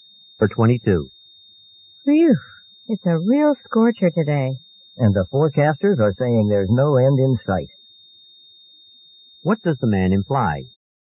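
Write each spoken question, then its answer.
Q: What does the man imply?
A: The hot weather will go on.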